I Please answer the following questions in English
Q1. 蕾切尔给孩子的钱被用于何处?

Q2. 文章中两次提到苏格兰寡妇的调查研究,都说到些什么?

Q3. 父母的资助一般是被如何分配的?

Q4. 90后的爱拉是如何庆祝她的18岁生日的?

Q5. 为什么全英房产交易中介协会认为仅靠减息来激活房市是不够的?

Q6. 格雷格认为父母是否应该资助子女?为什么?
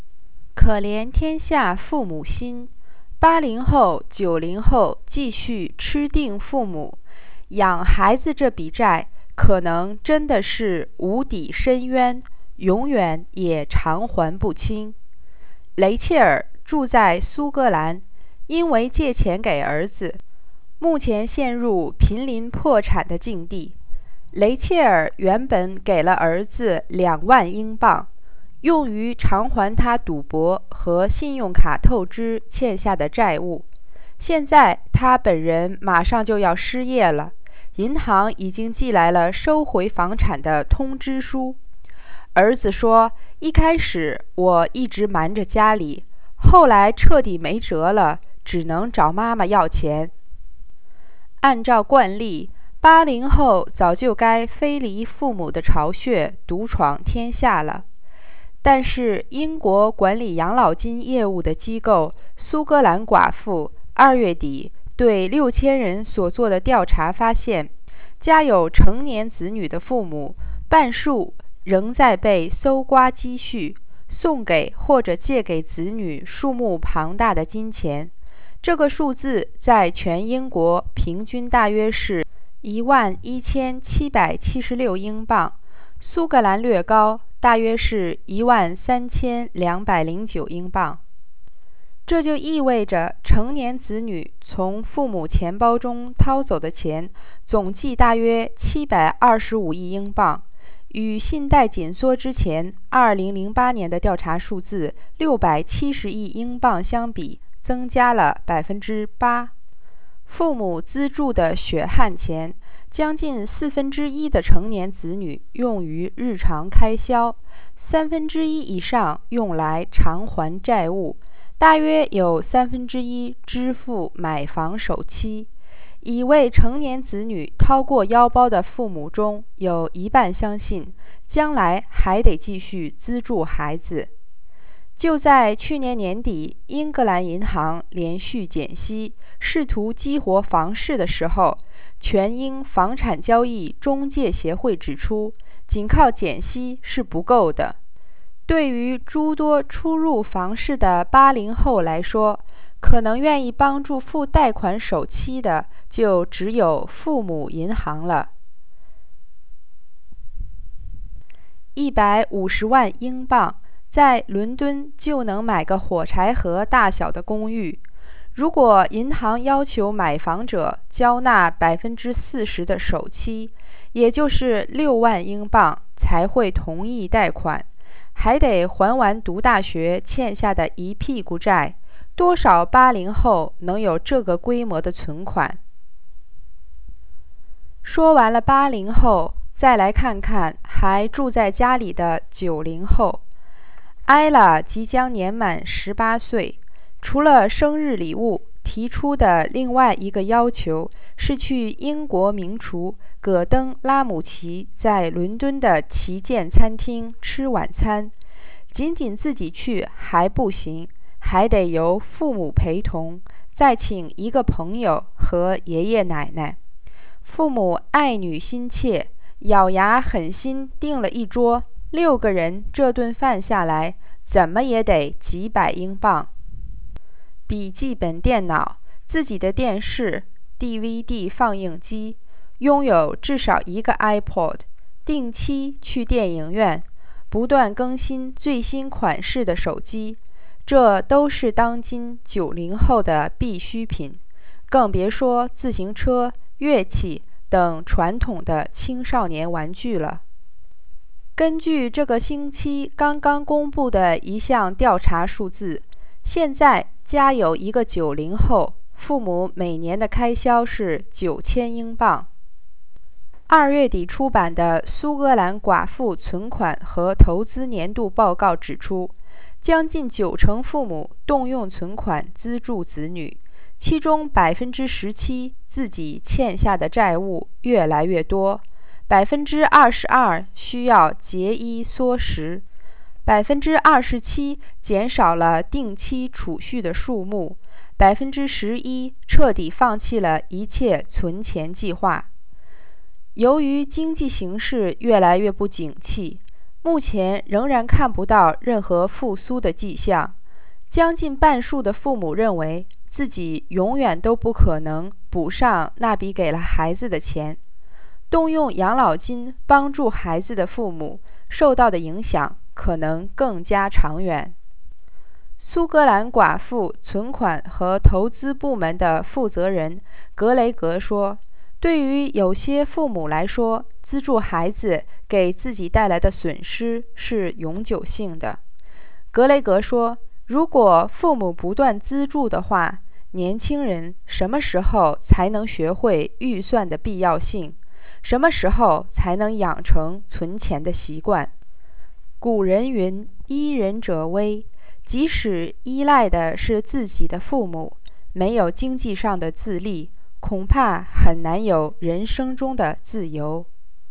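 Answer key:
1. To pay off her son's gambling and credit card debts.
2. Half of parents with adult children still give or lend them large sums (about £11,776 on average); nearly 90% of parents use savings to support children, 17% are in growing debt, 22% cut back spending, 27% save less, and 11% have stopped saving.
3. Nearly a quarter goes on daily expenses, over a third on paying debts, and about a third on house deposits.
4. Dinner at Gordon Ramsay's flagship London restaurant with her parents, a friend and her grandparents.
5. Because first-time buyers can't afford the large deposits (e.g. 40%, £60,000) banks require, and they also have student debt; only parents may help.
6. No; for some parents the loss is permanent, and if parents keep paying, young people never learn to budget or save.

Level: 3rd Year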